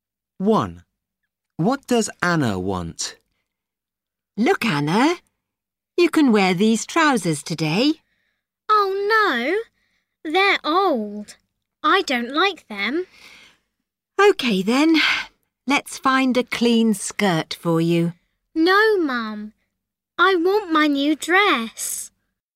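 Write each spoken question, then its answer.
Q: What does Anna want?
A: her new dress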